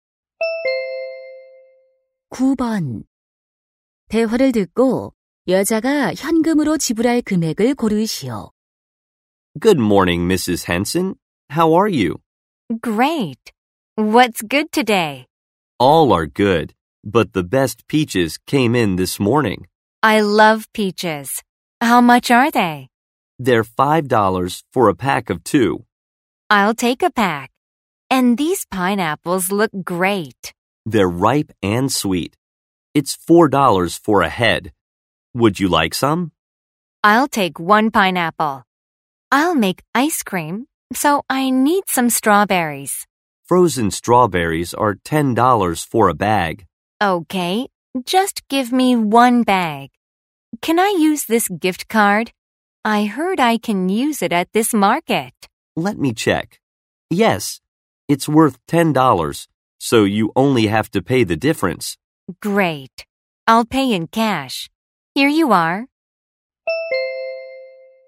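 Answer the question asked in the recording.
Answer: 9달러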